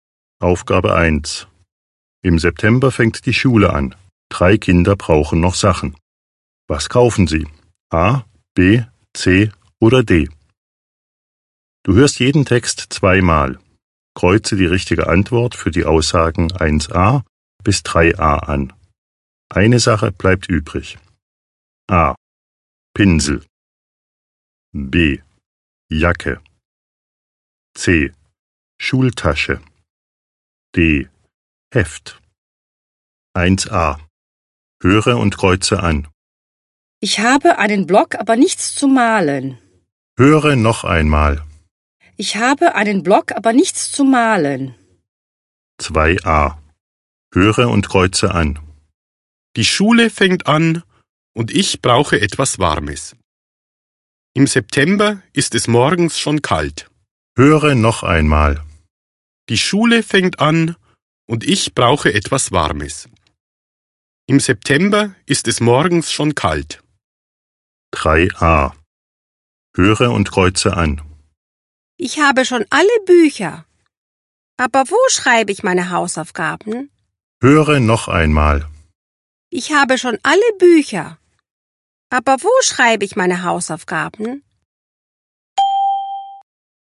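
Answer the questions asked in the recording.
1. A: Pinsel
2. B: Jacke
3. D: Heft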